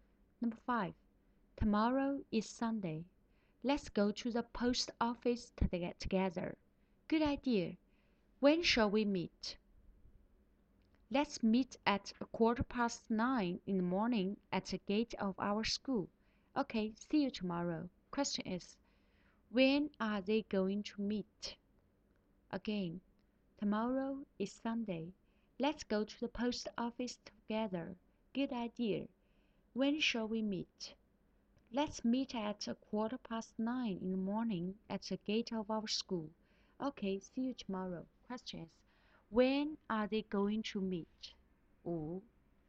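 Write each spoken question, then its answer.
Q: when are they going to meet?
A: At 9:15 in the morning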